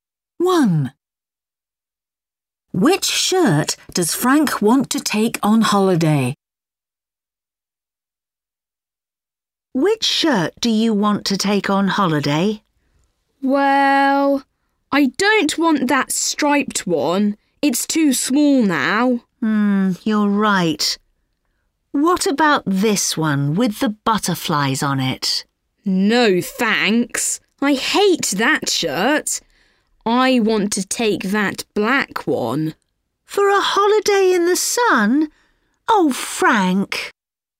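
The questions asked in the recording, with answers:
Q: Which shirt does Frank want to take on holiday?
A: The black one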